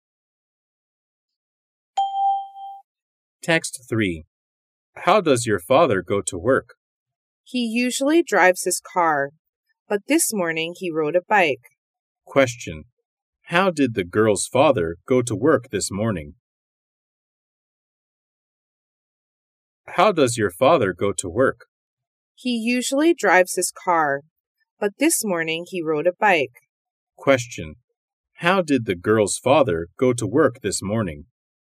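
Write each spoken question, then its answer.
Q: How did the girl's father go to work this morning?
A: He rode a bike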